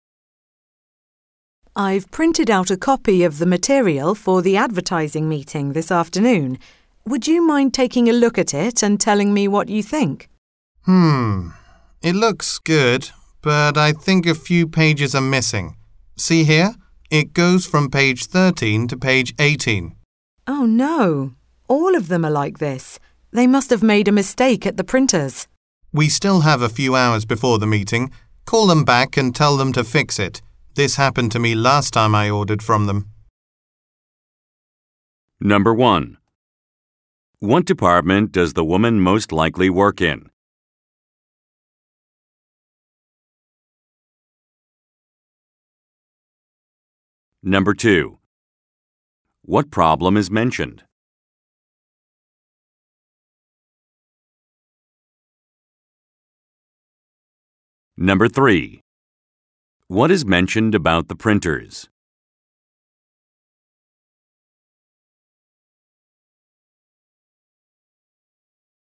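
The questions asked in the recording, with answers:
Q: What problem is mentioned?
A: Some pages are missing from the printed material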